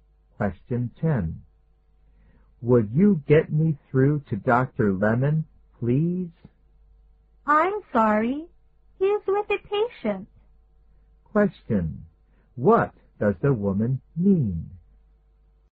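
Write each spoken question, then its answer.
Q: What does the woman mean?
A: Dr. Lemon is busy with a patient and can't take the call now.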